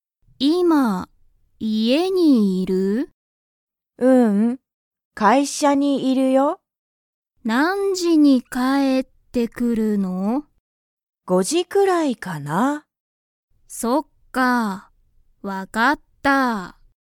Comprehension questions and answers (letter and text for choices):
ジュンの母(はは)は____くらいに帰(かえ)ってくる。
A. 4時(じ)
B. 5時(じ)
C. 6時(じ)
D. 7時(じ)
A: B. 5時(じ)

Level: Level 1